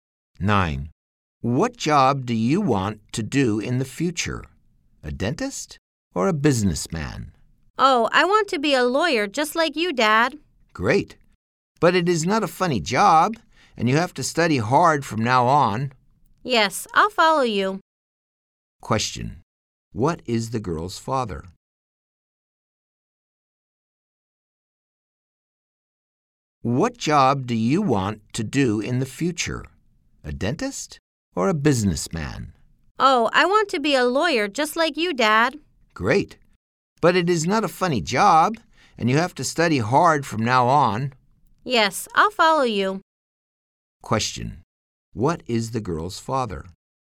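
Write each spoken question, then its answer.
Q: Question. What is the girl's father?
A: A lawyer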